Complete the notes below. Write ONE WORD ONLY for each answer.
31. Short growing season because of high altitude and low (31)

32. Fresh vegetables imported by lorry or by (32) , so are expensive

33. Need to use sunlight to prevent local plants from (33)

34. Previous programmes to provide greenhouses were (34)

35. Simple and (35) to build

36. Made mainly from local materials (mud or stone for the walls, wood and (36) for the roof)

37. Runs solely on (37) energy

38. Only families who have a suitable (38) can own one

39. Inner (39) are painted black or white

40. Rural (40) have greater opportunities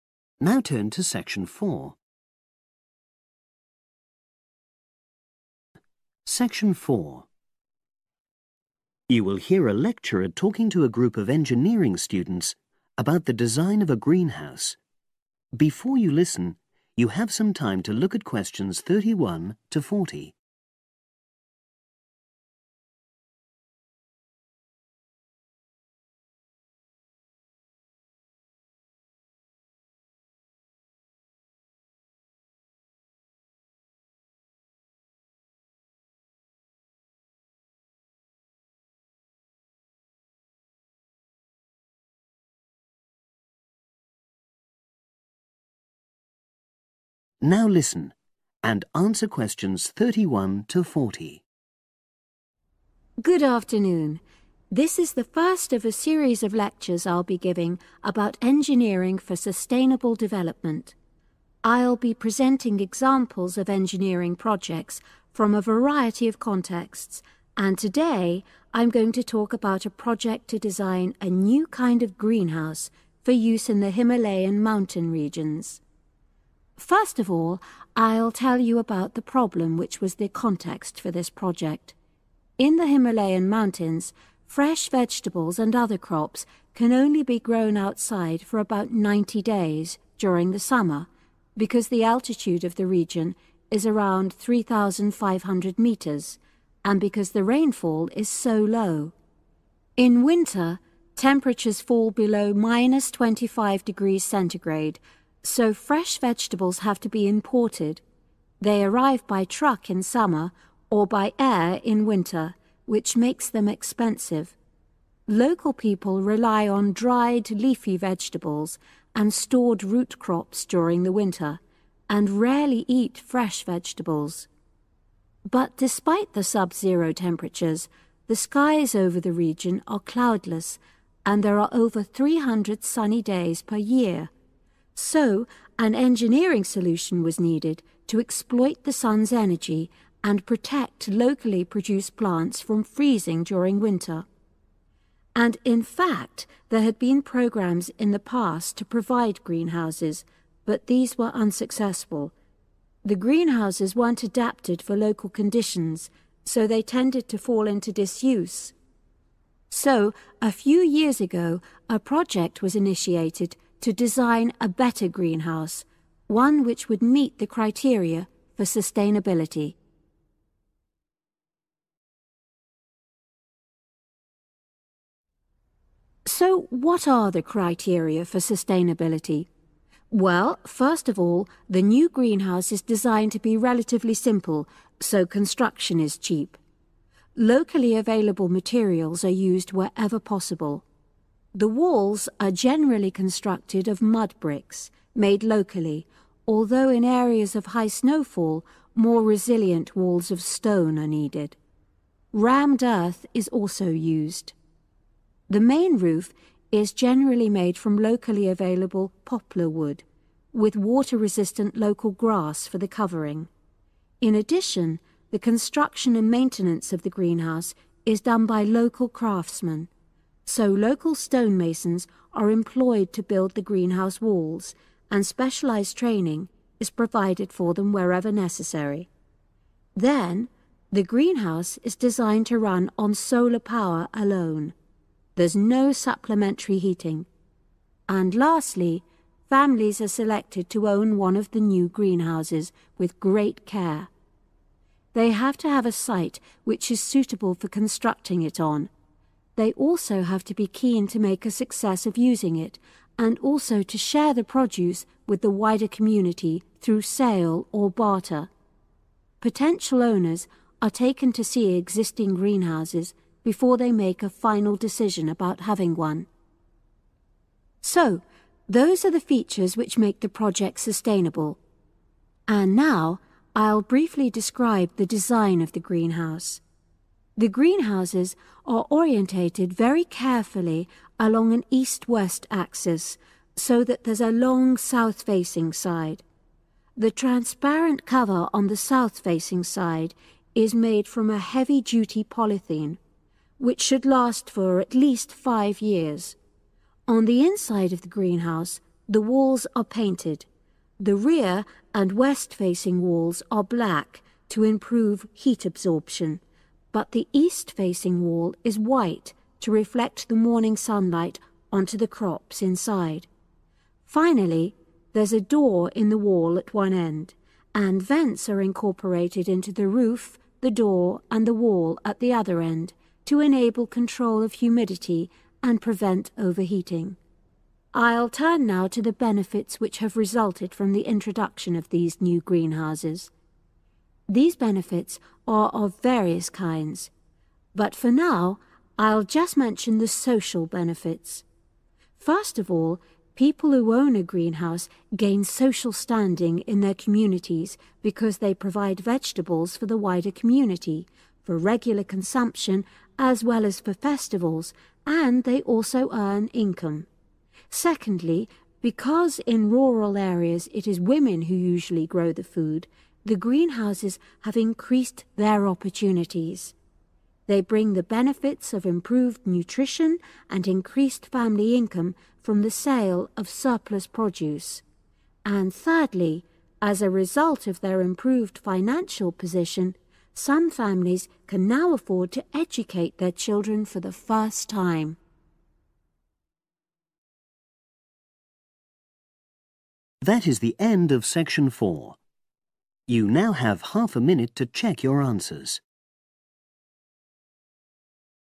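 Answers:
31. rainfall
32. air
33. freezing
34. unsuccessful
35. cheap
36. grass
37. solar
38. site
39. walls
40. women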